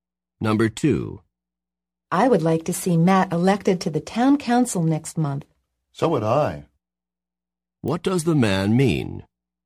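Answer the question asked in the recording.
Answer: He also wants Matt to be elected to the town council.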